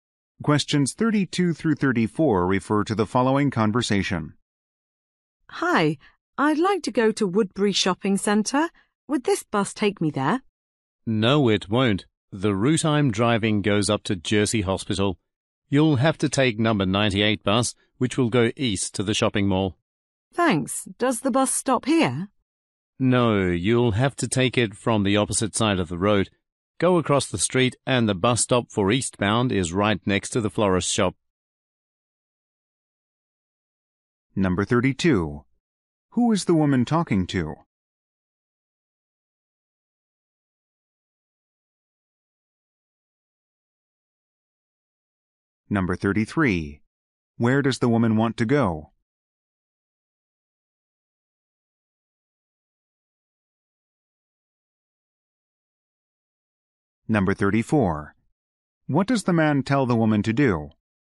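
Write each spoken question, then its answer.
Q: Who is the woman talking to?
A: A bus driver

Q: Where does the woman want to go?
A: Woodbury Shopping Centre

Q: What does the man tell the woman to do?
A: Cross the street and take the number 98 bus from the stop next to the florist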